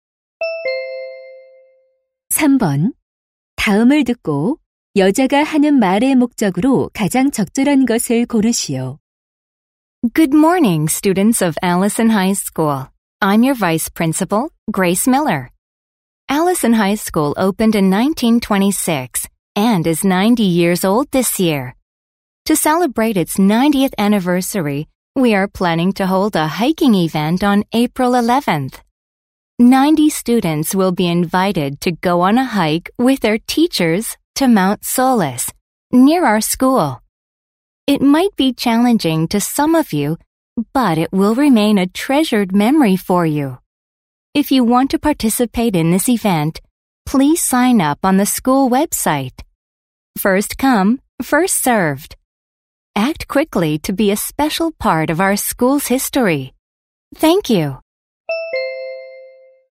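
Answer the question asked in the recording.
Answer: 개교 90주년 기념 등산 행사 참가 신청을 독려하려고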